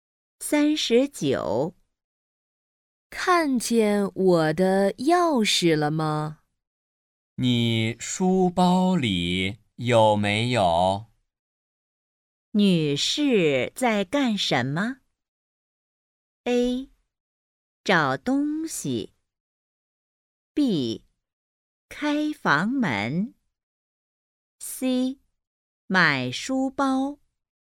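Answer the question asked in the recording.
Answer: A: 找东西。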